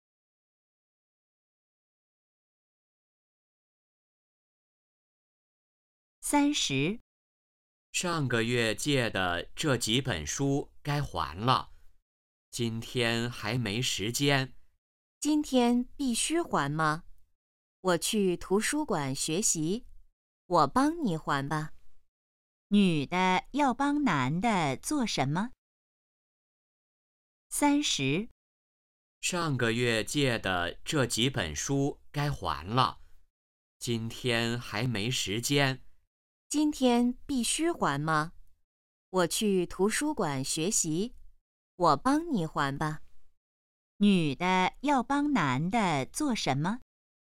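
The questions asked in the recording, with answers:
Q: 女的要帮男的做什么?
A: 还书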